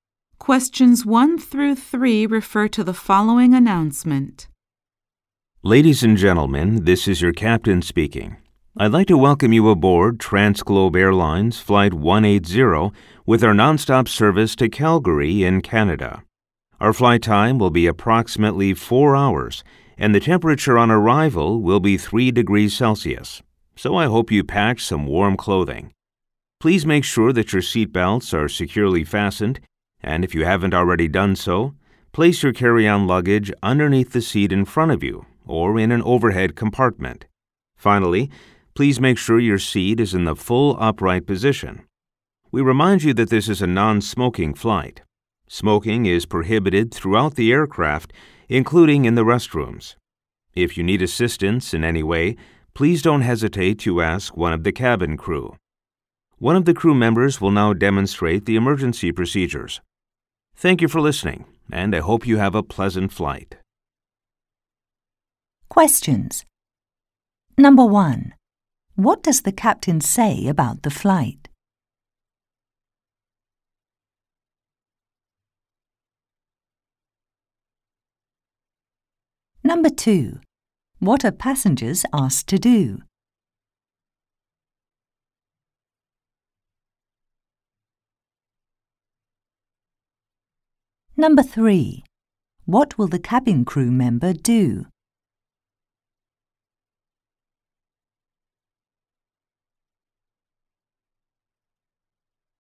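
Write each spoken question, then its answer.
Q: What will the cabin crew member do?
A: Demonstrate the emergency procedures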